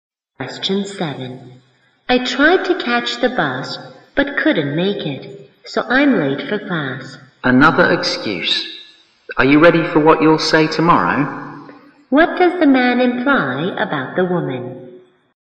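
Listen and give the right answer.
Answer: She is often late and makes excuses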